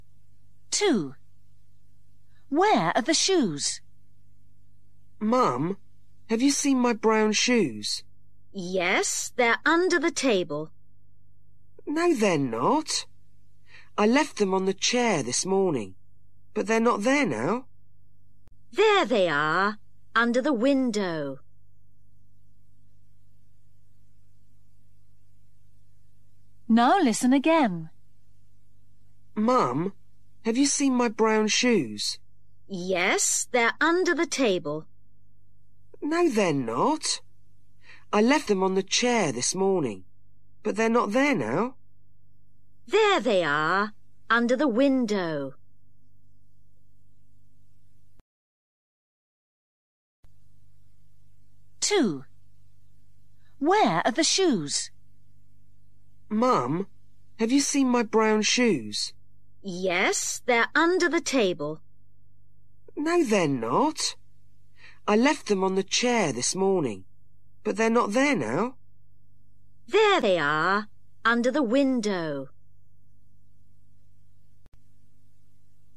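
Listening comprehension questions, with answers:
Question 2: Where are the shoes?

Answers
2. Under the window

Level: KELAS 6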